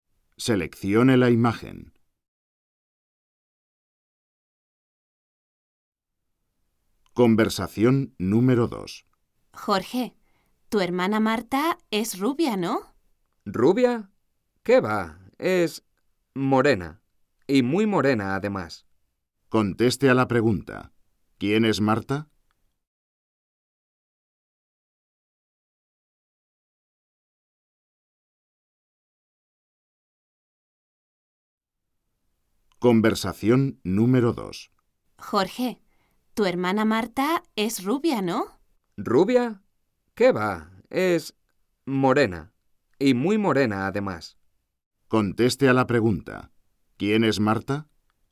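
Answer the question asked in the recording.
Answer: La hermana de Jorge, una chica muy morena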